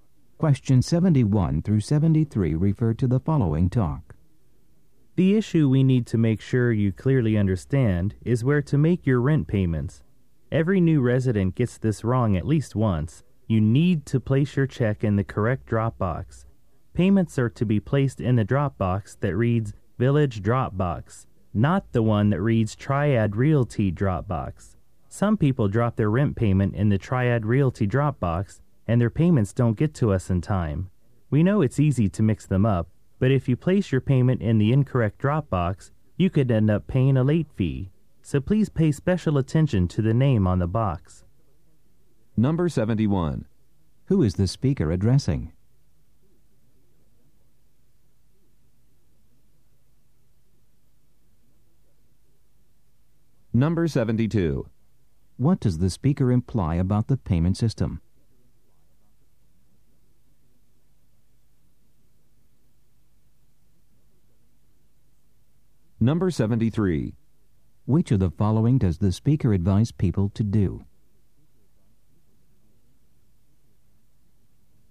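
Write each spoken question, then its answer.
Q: Who is the speaker addressing?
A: New residents

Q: What does the speaker imply about the payment system?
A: The two drop boxes are easy to mix up

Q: Which of the following does the speaker advise people to do?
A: Pay attention to the name on the drop box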